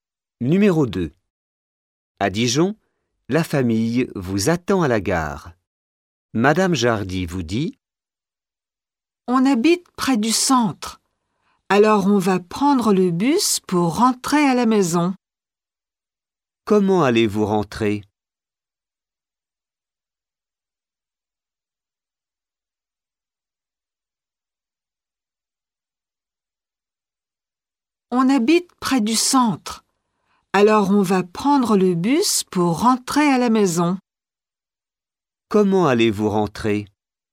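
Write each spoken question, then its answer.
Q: Comment allez-vous rentrer ?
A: En bus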